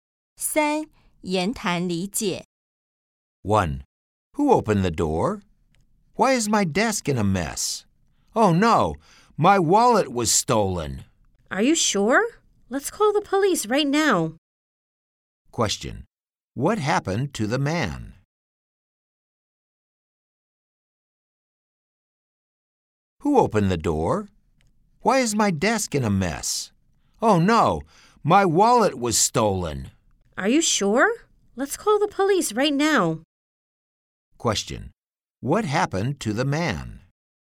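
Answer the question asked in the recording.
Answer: His wallet was stolen.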